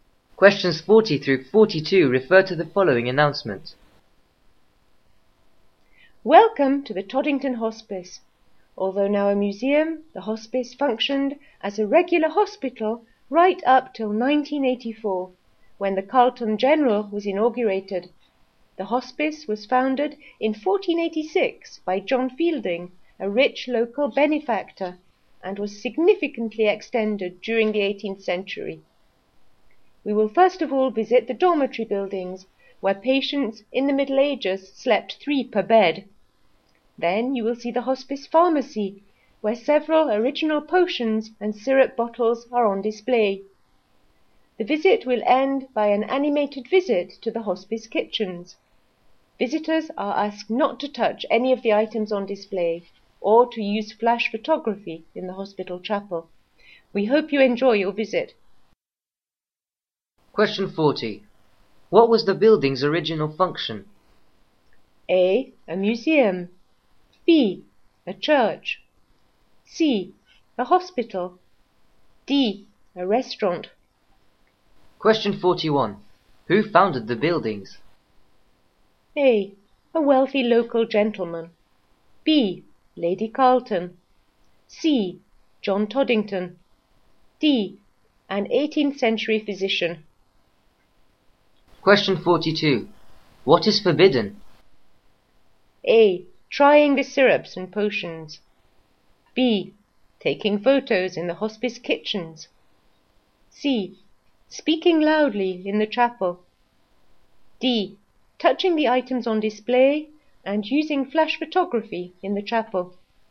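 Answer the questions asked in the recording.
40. C: A hospital.
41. A: A wealthy local gentleman.
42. D: Touching the items on display and using flash photography in the chapel.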